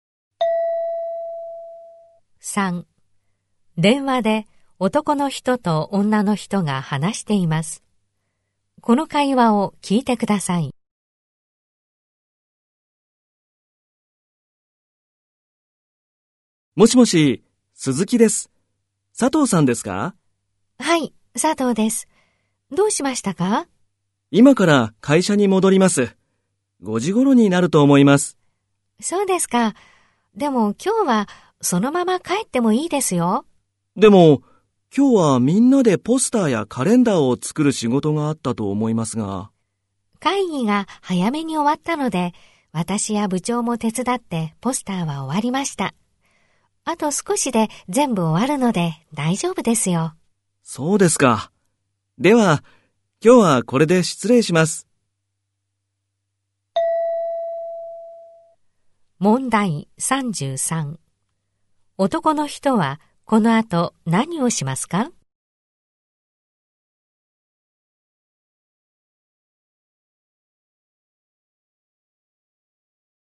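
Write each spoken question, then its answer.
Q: 男の人はこの後何をしますか?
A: 会社に戻らずそのまま帰る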